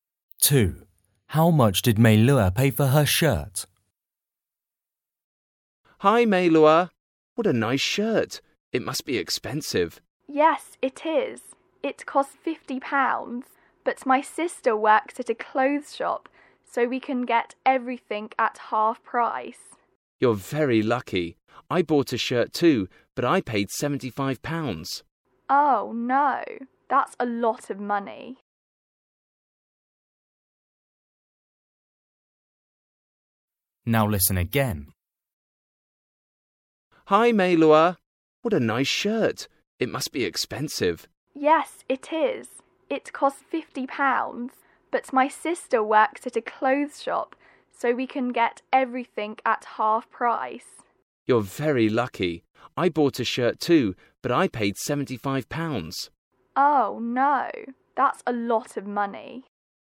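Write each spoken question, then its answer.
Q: How much did Meilua pay for her shirt?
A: £25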